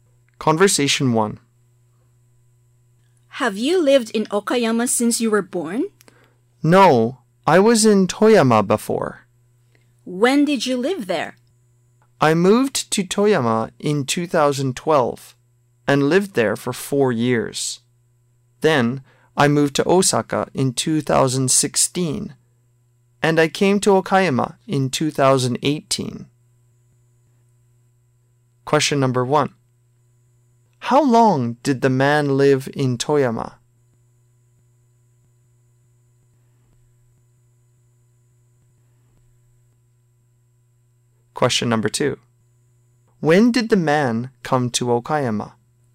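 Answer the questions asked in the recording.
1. For 4 years
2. In 2018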